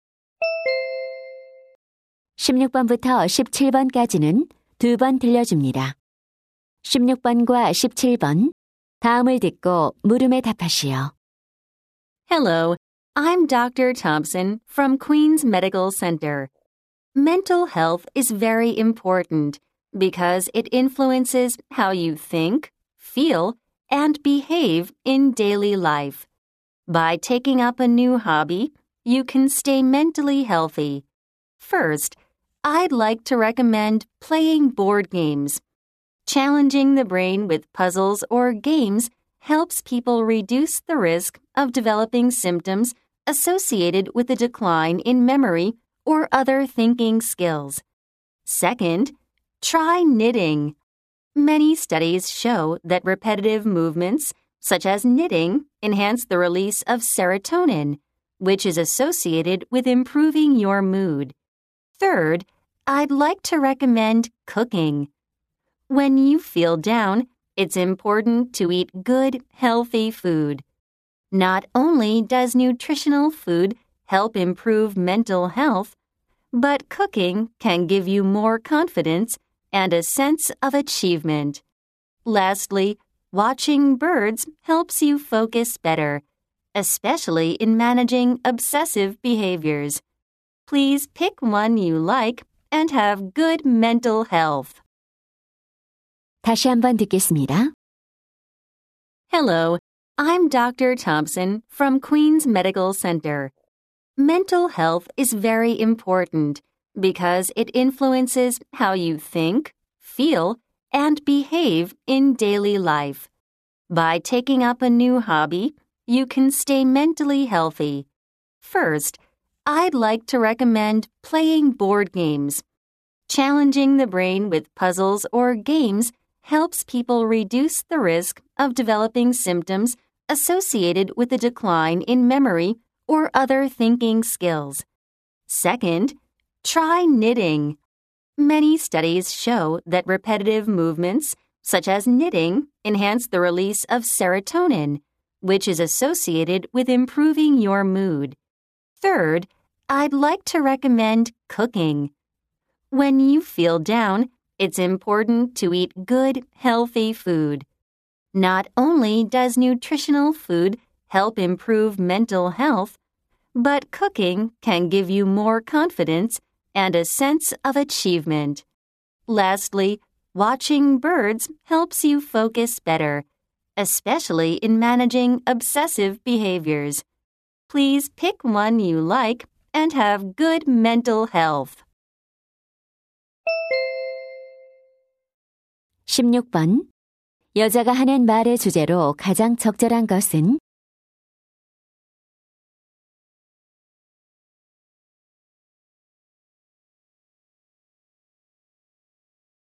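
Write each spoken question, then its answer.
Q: 여자가 하는 말의 주제로 가장 적절한 것은?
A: 정신 건강에 도움이 되는 취미 활동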